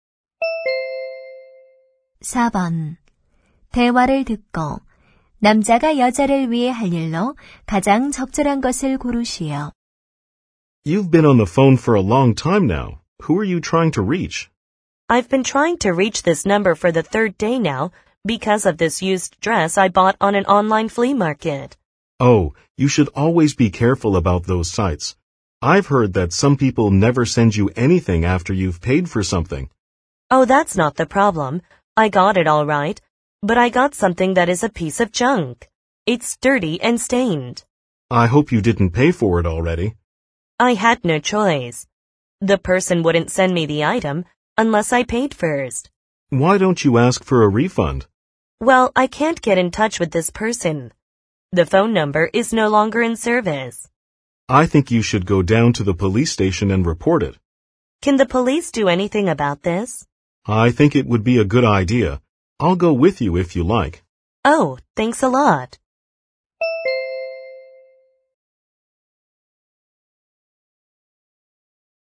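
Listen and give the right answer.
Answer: 경찰서에 함께 가기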